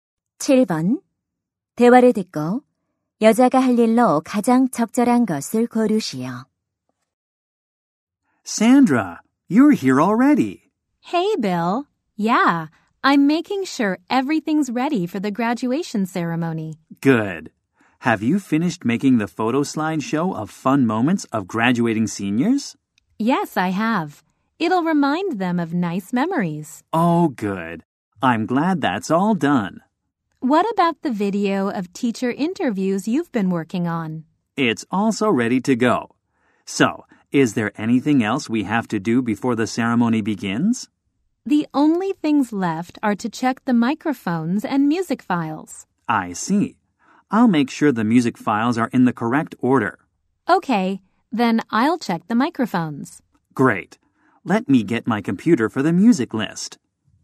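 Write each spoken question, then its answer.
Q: 대화를 듣고 여자가 할 일로 가장 적절한 것을 고르시오.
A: 마이크 점검하기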